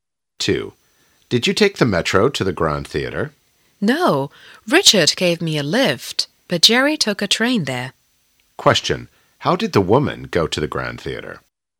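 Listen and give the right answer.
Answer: By car; Richard gave her a lift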